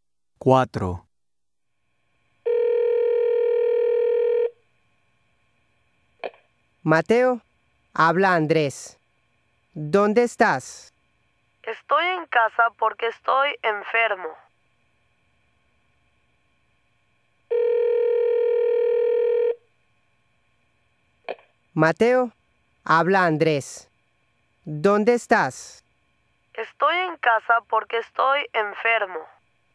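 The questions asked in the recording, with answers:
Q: Mateo, habla Andrés. ¿Dónde estás?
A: En casa, porque está enfermo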